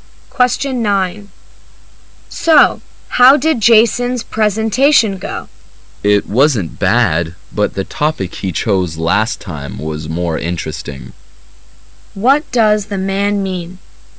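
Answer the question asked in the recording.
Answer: Jason's presentation was fine, but his topic last time was more interesting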